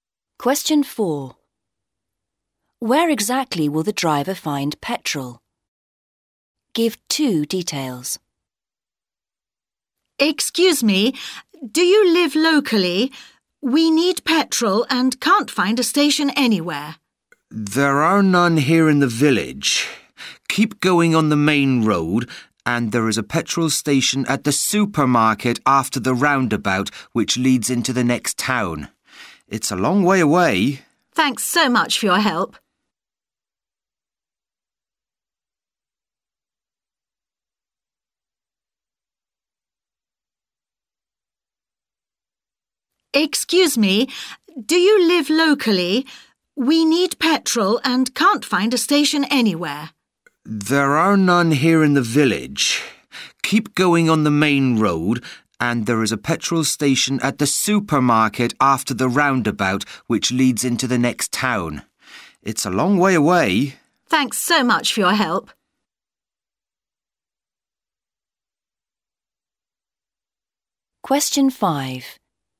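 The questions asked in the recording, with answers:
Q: Where exactly will the driver find petrol?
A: At the supermarket, after the roundabout on the main road into the next town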